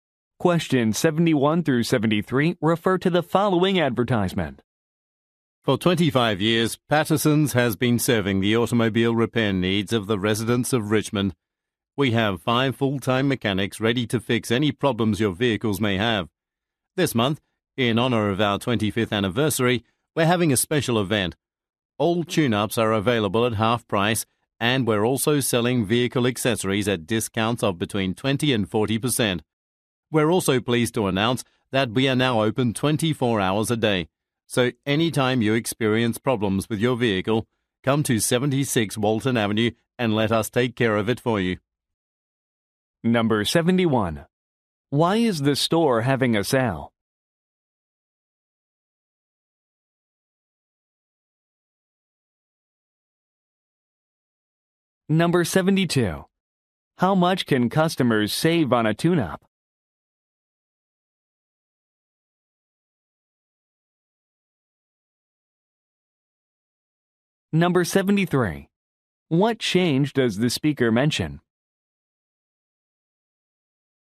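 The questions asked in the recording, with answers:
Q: Why is the store having a sale?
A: To celebrate its 25th anniversary

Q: How much can customers save on a tune-up?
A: Half price (50%)

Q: What change does the speaker mention?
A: It is now open 24 hours a day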